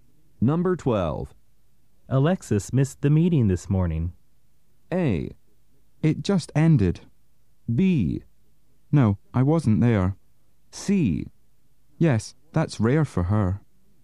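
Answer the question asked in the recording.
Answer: C: Yes, that's rare for her.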